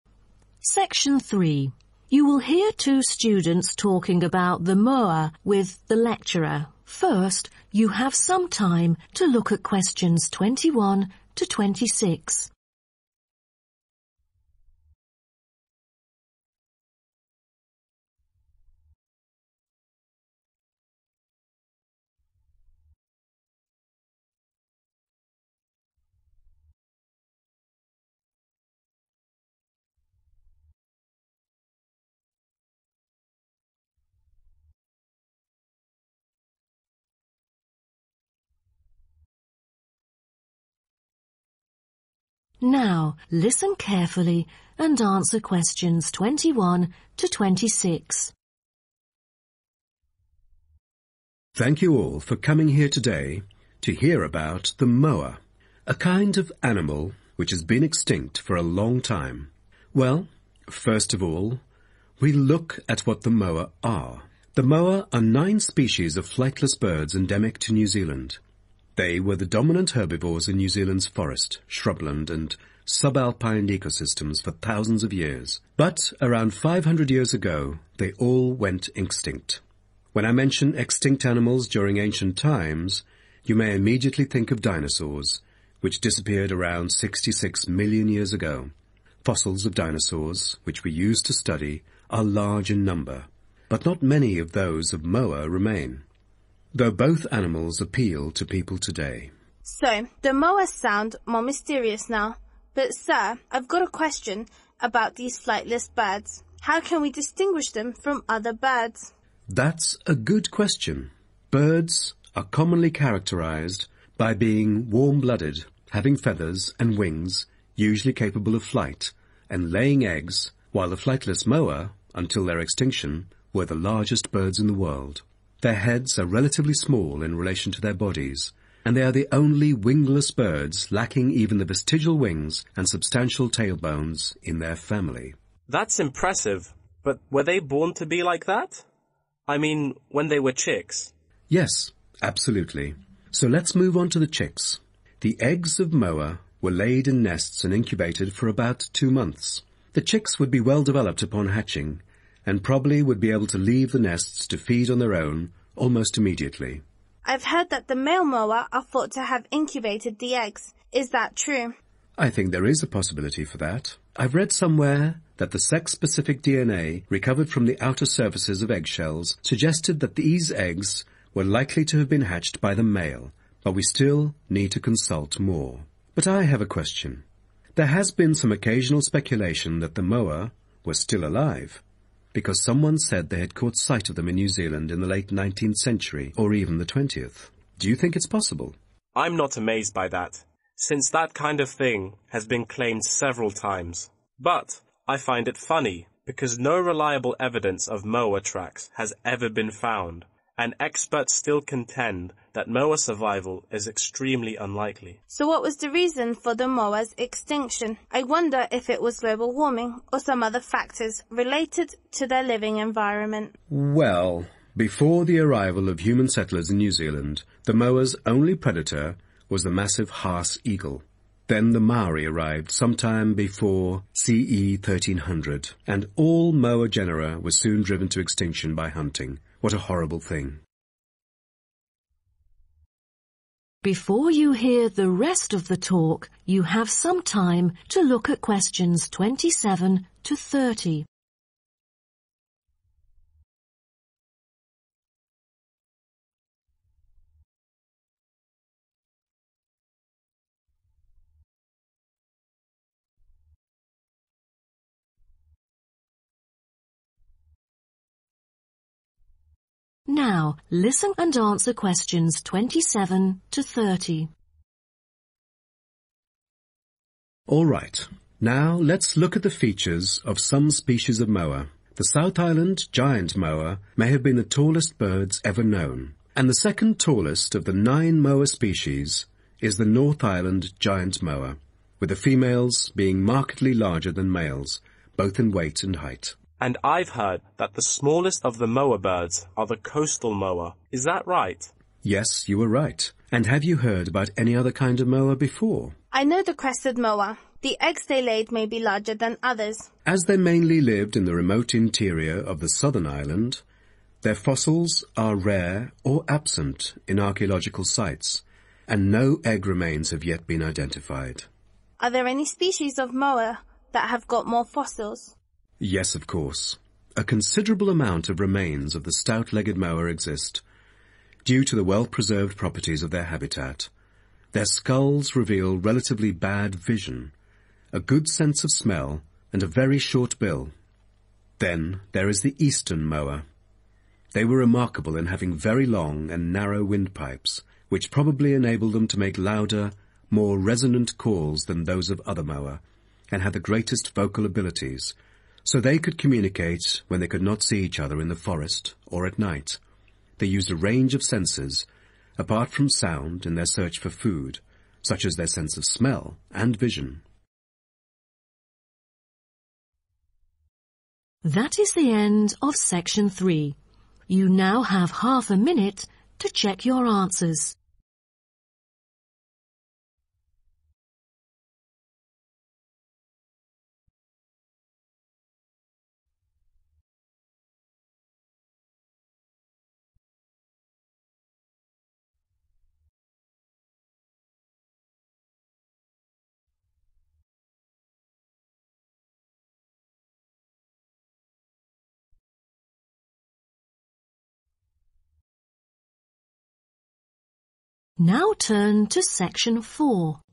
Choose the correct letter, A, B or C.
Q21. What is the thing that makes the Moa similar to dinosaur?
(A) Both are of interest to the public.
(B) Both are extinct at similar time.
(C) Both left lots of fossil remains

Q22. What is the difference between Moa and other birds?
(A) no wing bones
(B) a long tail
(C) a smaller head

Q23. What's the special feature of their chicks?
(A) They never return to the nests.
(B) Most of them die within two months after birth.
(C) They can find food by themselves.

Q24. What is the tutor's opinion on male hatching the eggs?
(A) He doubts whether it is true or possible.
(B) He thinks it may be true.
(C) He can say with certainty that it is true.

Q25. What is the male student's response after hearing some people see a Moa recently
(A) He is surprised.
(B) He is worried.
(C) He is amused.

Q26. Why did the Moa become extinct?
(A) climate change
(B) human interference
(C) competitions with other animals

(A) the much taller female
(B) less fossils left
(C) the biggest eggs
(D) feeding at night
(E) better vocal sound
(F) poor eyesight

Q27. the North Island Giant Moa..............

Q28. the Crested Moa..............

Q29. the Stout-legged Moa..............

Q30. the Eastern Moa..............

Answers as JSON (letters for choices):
{"21": "A", "22": "A", "23": "C", "24": "B", "25": "C", "26": "B", "27": "A", "28": "B", "29": "F", "30": "E"}